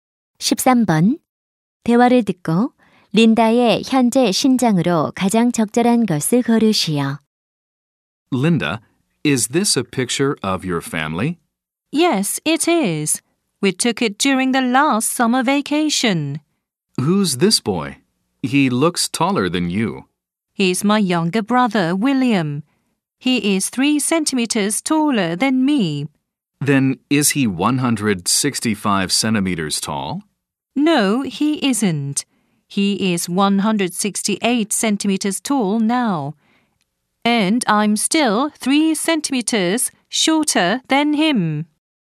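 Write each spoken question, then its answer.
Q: 대화를 듣고 린다의 현재 신장으로 가장 적절한 것을 고르시오.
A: 165cm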